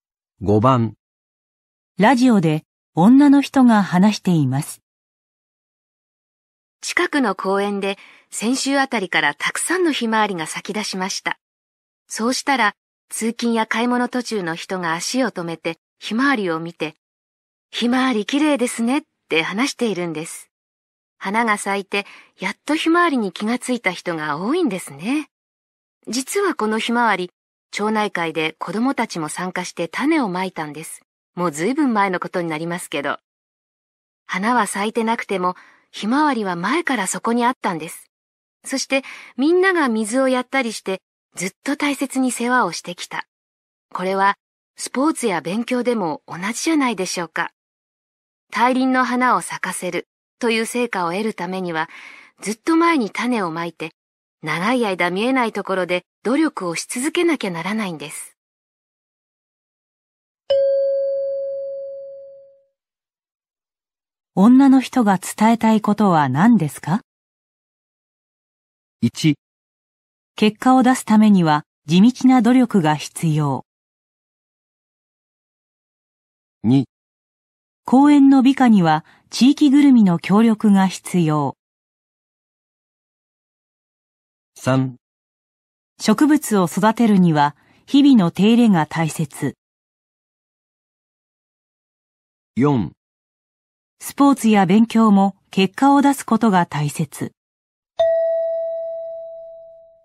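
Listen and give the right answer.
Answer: 1: 結果を出すためには地道な努力が必要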